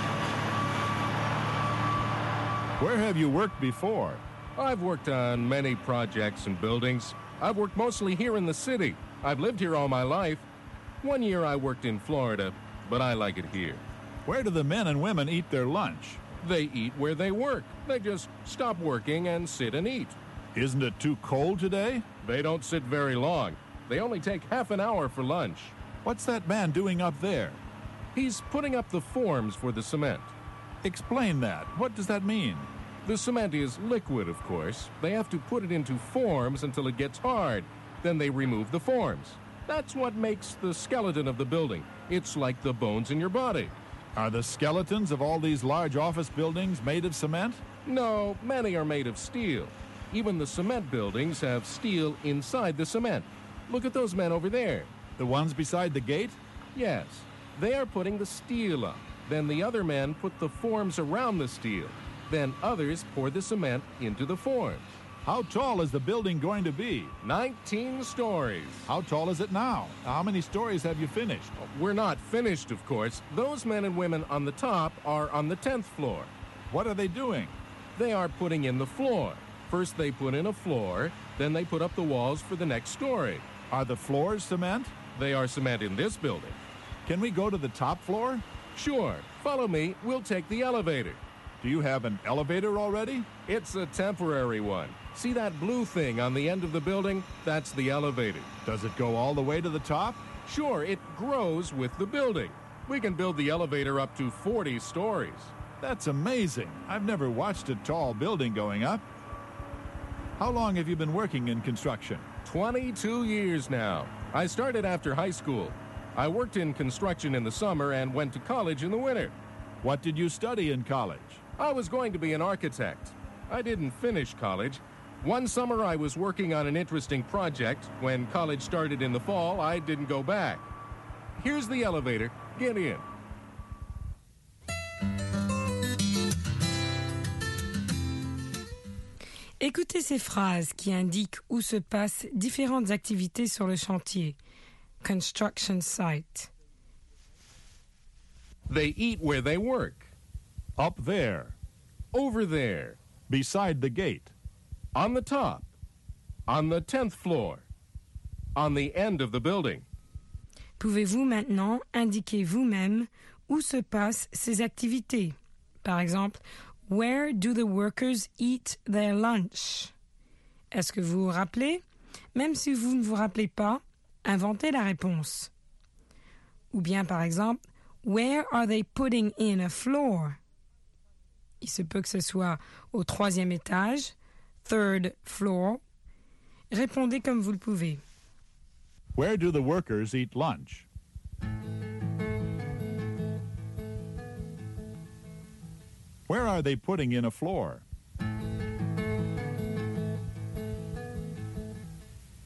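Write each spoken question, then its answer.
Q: Where do the workers eat lunch?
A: Where they work

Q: Where are they putting in a floor?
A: On the top, on the 10th floor

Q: Where is the elevator?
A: On the end of the building

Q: Where are the workers putting the steel up?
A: Beside the gate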